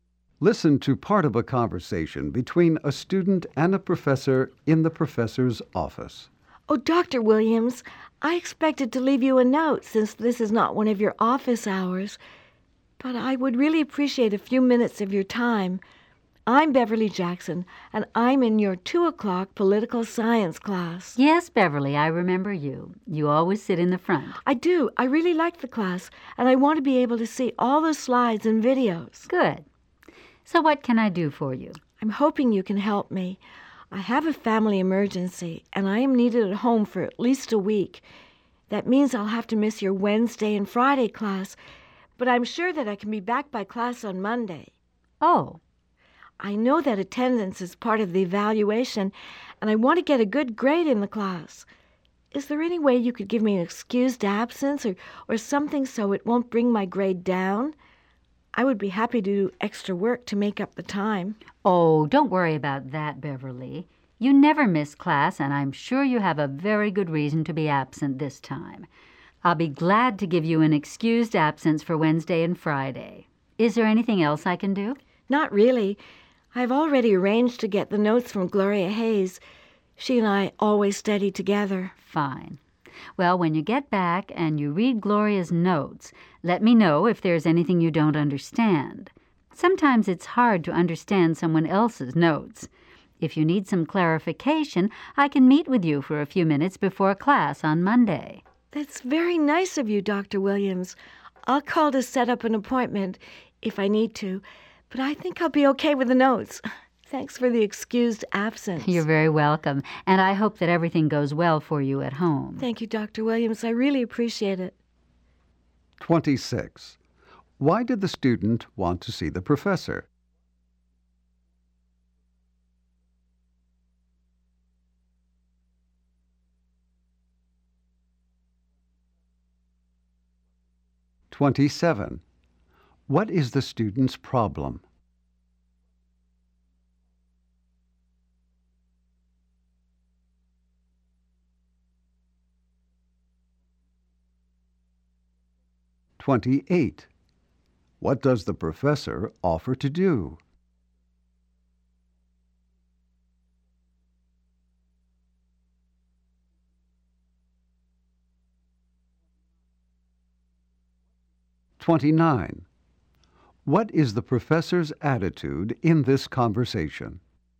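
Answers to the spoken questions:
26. To ask for an excused absence
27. She has a family emergency and must miss class for a week
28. Meet with her before class on Monday to clarify the notes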